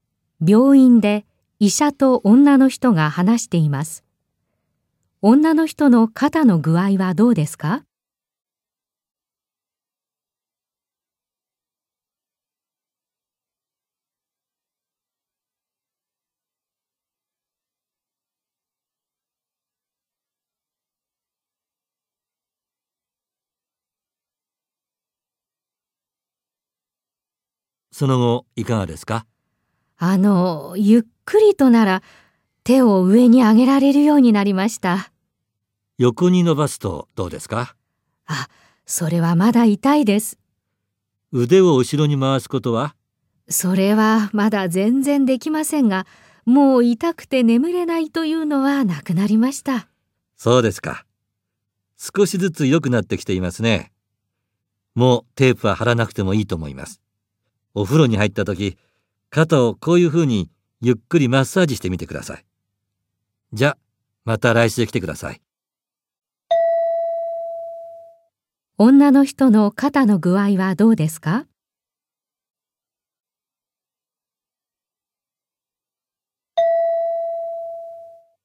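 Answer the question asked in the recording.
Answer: 少しずつ良くなっている。ゆっくりなら手を上げられ、痛くて眠れないことはなくなったが、横に伸ばすとまだ痛く、腕を後ろに回すことはまだできない。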